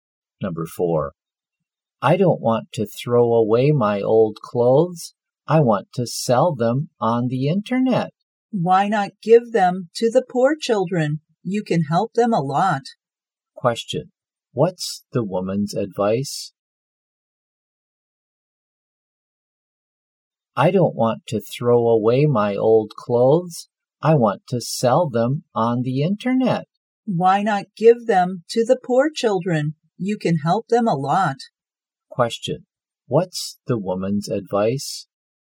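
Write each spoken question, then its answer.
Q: Question, what's the woman's advice?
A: Give the old clothes to the poor children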